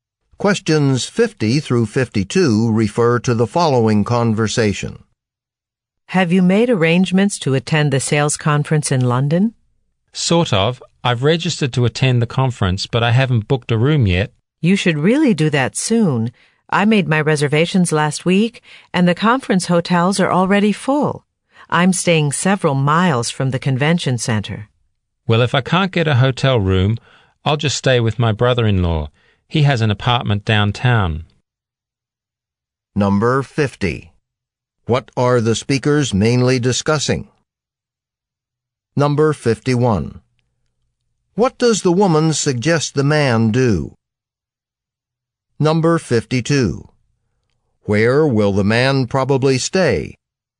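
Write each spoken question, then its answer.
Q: What are the speakers mainly discussing?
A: Attending a sales conference in London

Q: What does the woman suggest the man do?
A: Book a hotel room soon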